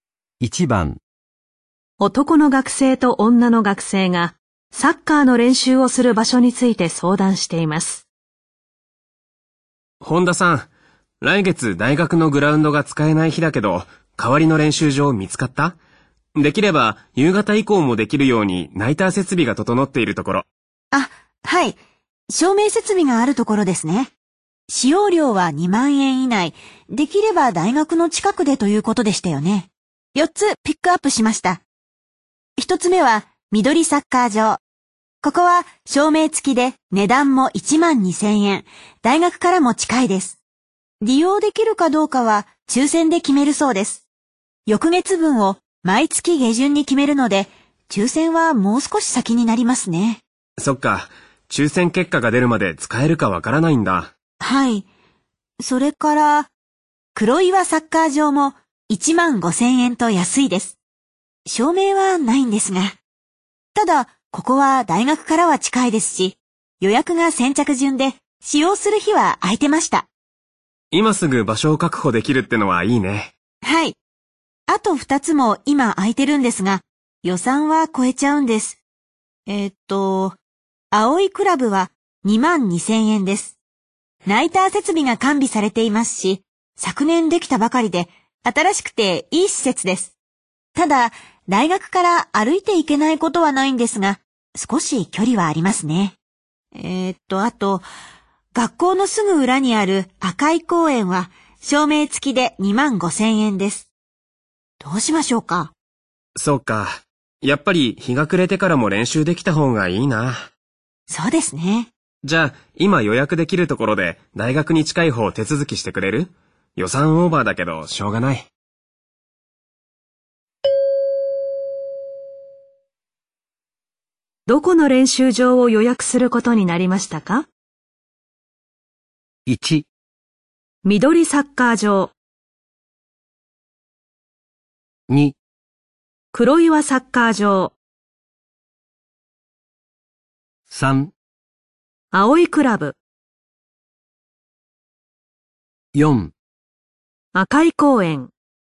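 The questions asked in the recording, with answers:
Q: どこの練習場を予約することになりましたか?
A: 4: 赤い公園。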